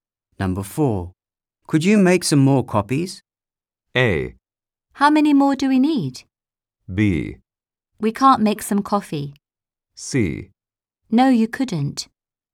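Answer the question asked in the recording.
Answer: A: How many more do we need?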